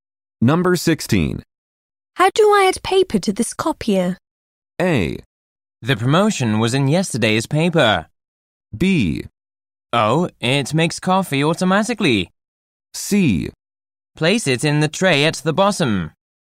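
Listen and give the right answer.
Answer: C: Place it in the tray at the bottom.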